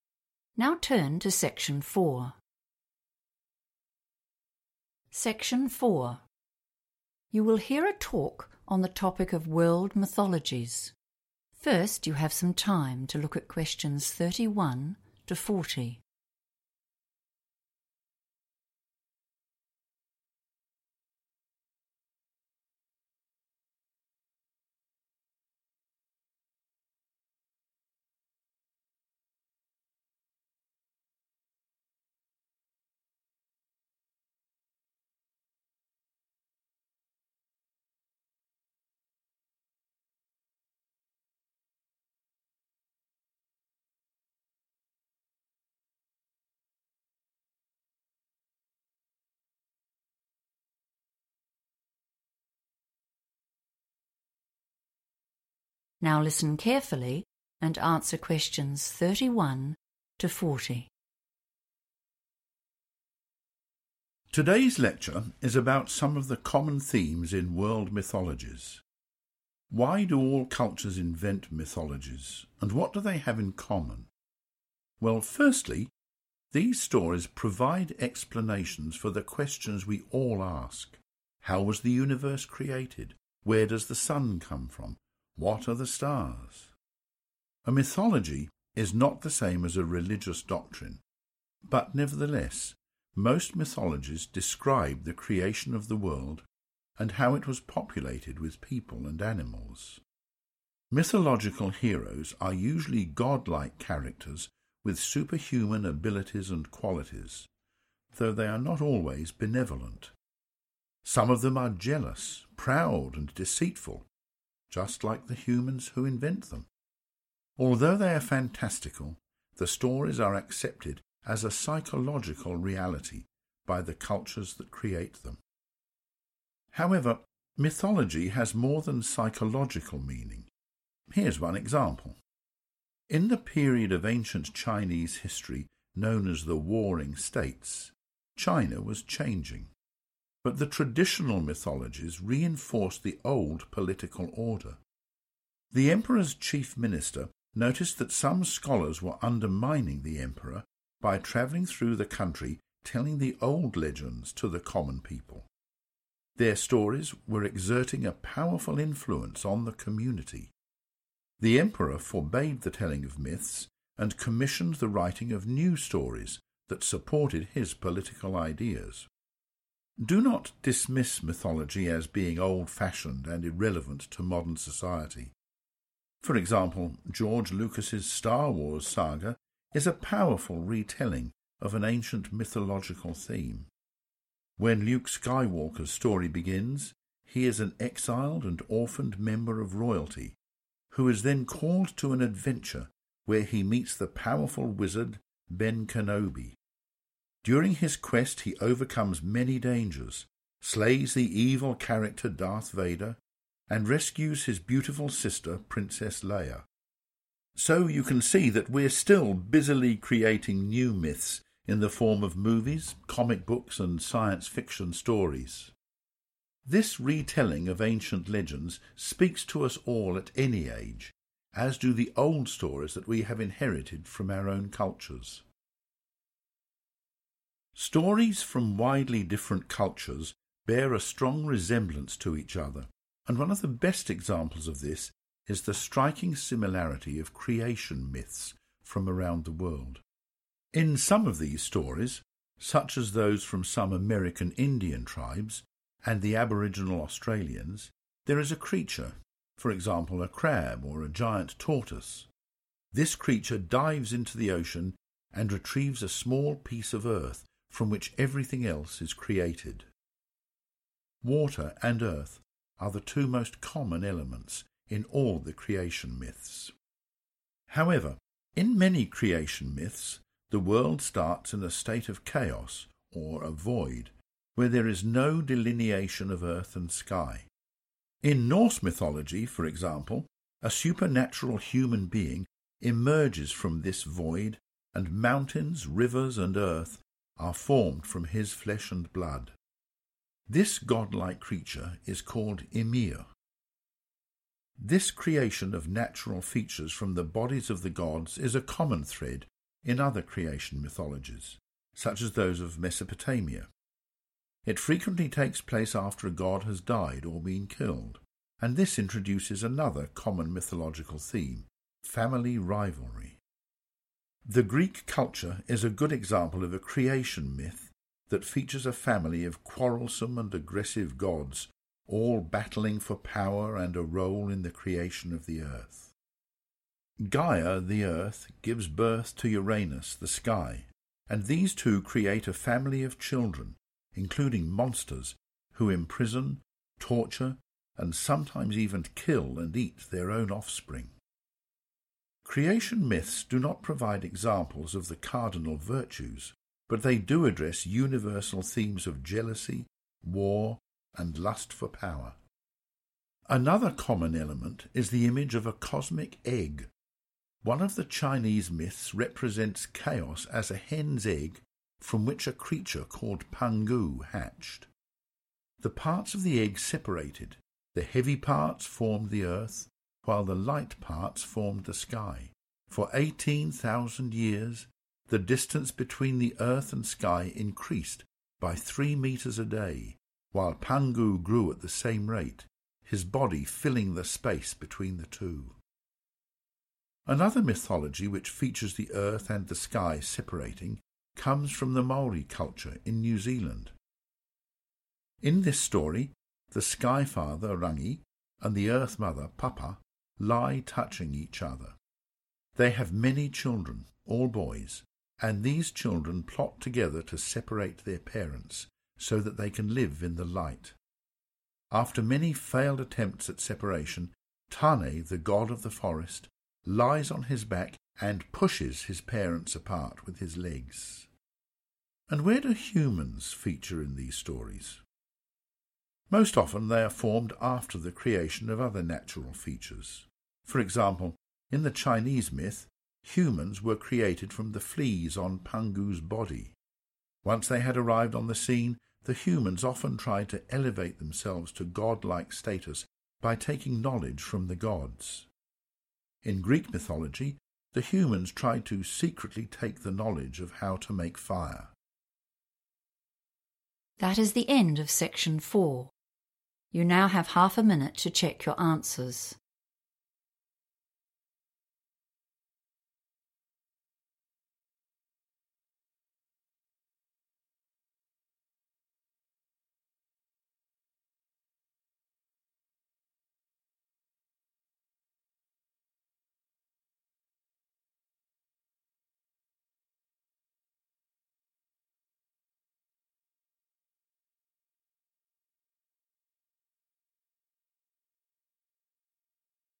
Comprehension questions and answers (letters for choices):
Choose TWO letters, A—E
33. The Warring States are mentioned as an example of ...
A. how myths affect poor people.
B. political change in modern China.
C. the social power of myths.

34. Luke Skywalker's story is told to show that ...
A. modern myths have new values and ideas.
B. myths are still being retold today.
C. myths are written mainly for young people.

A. Greek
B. Norse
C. Chinese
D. Māori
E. Australian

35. An animal brings up life from the sea.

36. The world is formed from the body of a god.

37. The gods fight with each other.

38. The Earth forms as a god becomes bigger.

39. A son separates his parents.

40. People steal from the gods.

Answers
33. C
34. B
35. E
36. B
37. A
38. C
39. D
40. A

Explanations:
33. The correct answer is 'C' because the transcript explains that myths have more than just a personal meaning; they also have a 'social' effect. The speaker uses the Warring States period to show how old stories were used to make people doubt the Emperor's power. The text says these stories had a 'powerful influence' on the people, which is a synonym for 'social power.' This also explains why the Emperor eventually felt he had to ban the stories and write new ones.
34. The correct answer is supported by the speaker using the 'Star Wars' movie as an example. The speaker argues that mythology is not 'old-fashioned' or 'irrelevant' to today's world. By describing Luke Skywalker's journey, the speaker shows that we are 'still busily creating' stories that are basically a 'retelling' of ancient patterns in the form of modern movies.
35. The correct answer is E because the lecturer specifically mentions creation myths from Aboriginal Australians as examples where a creature, such as a crab or tortoise, goes into the ocean to find a piece of earth. This earth is then used to create everything else, which matches the idea of an animal bringing up life from the sea.
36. The correct answer is B because the transcript specifically mentions that in Norse mythology, the physical world—including mountains, rivers, and the earth—was created using parts of a supernatural or god-like creature named Ymir. It describes how these natural features were made from his flesh and blood, which means the world was formed from a god's body.
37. The correct answer is Greek mythology because the text describes its gods as being 'quarrelsome' (meaning they argue) and 'aggressive.' It specifically mentions that they are 'battling' for power, which is another way to say they are fighting with each other.
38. The correct answer is C because the lecturer describes a Chinese myth about a character named Pangu. In this story, Pangu hatches from an egg, and as he grows taller, the space between the earth and the sky also gets larger. This matches the idea of the earth forming or taking shape as a god grows bigger.
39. The correct answer is D because the transcript specifically describes a story from the Māori culture in New Zealand. In this story, the sky (the father) and the earth (the mother) are touching until their children decide to push them apart. One of their sons, Tane, successfully separates them by using his legs to push them away so the children can live in the light. Important words to notice are 'Maori culture', 'parents', and 'separate'.
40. The correct answer is Greek because the transcript explicitly mentions that in Greek mythology, humans attempted to "secretly take" the knowledge of fire. To "secretly take" something that belongs to someone else is a synonym for "stealing." This fits the description of people stealing from the gods.

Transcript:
Today's lecture is about some of the common themes in world mythologies. Why do all cultures invent mythologies, and what do they have in common? Well firstly, these stories provide explanations for the questions we all ask: How was the universe created? Where does the sun come from? What are the stars? A mythology is not the same as a religious doctrine, but nevertheless, most mythologies describe the creation of the world, and how it was populated with people and animals. Mythological heroes are usually god-like characters with superhuman abilities and qualities, though they are not always benevolent. Some of them are jealous, proud and deceitful, just like the humans who invent them. Although they are fantastical, the stories are accepted as a psychological reality by the cultures that create them.
However, mythology has more than psychological meaning. Here's one example. In the period of ancient Chinese history known as the Warring States, China was changing, but the traditional mythologies reinforced the old political order. The Emperor's chief minister noticed that some scholars were undermining the Emperor by travelling through the country telling the old legends to the common people. Their stories were exerting a powerful influence on the community. The Emperor forbade the telling of myths and commissioned the writing of new stories that supported his political ideas.
Do not dismiss mythology as being old-fashioned and irrelevant to modern society. For example, George Lucas's Star Wars saga is a powerful retelling of an ancient mythological theme. When Luke Skywalker's story begins, he is an exiled and orphaned member of royalty, who is then called to an adventure where he meets the powerful wizard Ben Kenobi. During his quest he overcomes many dangers, slays the evil character Darth Vader, and rescues his beautiful sister princess Leia. So, you can see that we're still busily creating new myths in the form of movies, comic books and science fiction stories. This retelling of ancient legends speaks to us all at any age, as do the old stories that we have inherited from our own cultures.
Stories from widely different cultures bear a strong resemblance to each other, and one of the best examples of this is the striking similarity of creation myths from around the world. In some of these stories, such as those from some American Indian tribes and Aboriginal Australians, there is a creature, for example, a crab or a giant tortoise. This creature dives into the ocean and retrieves a small piece of earth from which everything else is created. Water and earth are the two most common elements in all the creation myths.
However, in many creation myths, the world starts in a state of chaos, or a void, where there is no delineation of earth and sky. In Norse mythology, for example, a supernatural human being emerges from this void and mountains, rivers and earth are formed from his flesh and blood. This god-like creature is called Ymir. This creation of natural features from the bodies of the gods is a common thread in other creation mythologies, such as those of Mesopotamia. It frequently takes place after a god has died or been killed, and this introduces another common mythological theme: family rivalry.
The Greek culture is a good example of a creation myth that features a family of quarrelsome and aggressive gods, all battling for power and a role in the creation of the earth. Gaia the earth gives birth to Uranus, the sky, and these two create a family of children, including monsters, who imprison, torture and sometimes even kill and eat their own offspring. Creation myths do not provide examples of the cardinal virtues, but they do address universal themes of jealousy, war and lust for power.
Another common element is the image of a cosmic egg. One of the Chinese myths represents chaos as a hen's egg, from which a creature called Pangu hatches. The parts of the egg separated; the heavy parts formed the earth, while the light parts formed the sky. For eighteen thousand years, the distance between earth and sky increased by 3 metres a day, while Pangu grew at the same rate, his body filling the space between the two. Another mythology which features the earth and the sky separating comes from the Maori culture in New Zealand. In this story, the sky father Rangi, and the earth mother Papa, lie touching each other. They have many children, all boys, and these children plot together to separate their parents, so that they can live in the light. After many failed attempts at separation, Tane, the god of the forest, lies on his back and pushes his parents apart with his legs.
And where do humans feature in these stories? Most often, they are formed after the creation of other natural features. For example, in the Chinese myth, humans were created from the fleas on Pangu's body. Once they had arrived on the scene, the humans often tried to elevate themselves to god-like status by taking knowledge from the gods. In Greek mythology, the humans tried to secretly take the knowledge of how to make fire.